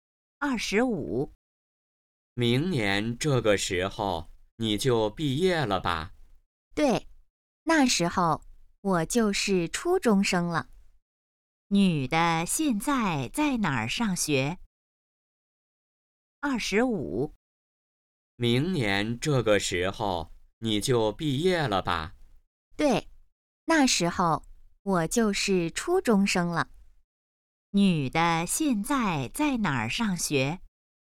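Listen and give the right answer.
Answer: 小学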